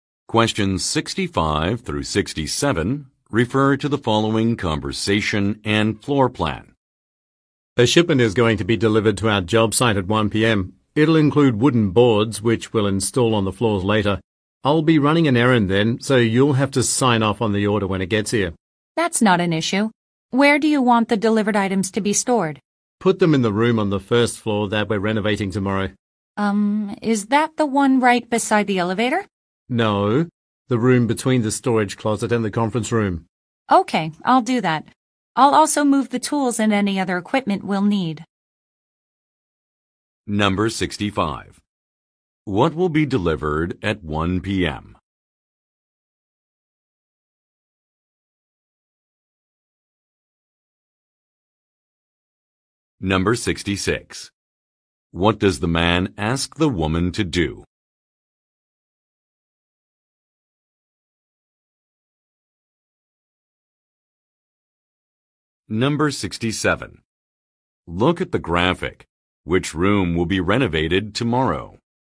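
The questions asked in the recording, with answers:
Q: What will be delivered at 1 p.m.?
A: A shipment of wooden boards for the floors

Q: What does the man ask the woman to do?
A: Sign off on the order when it arrives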